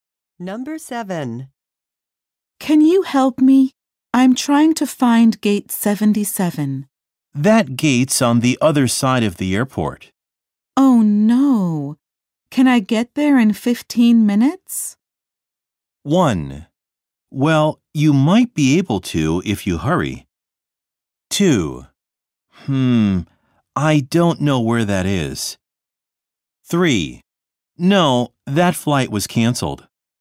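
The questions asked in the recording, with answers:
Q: Oh no. Can I get there in 15 minutes?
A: 1: Well, you might be able to if you hurry.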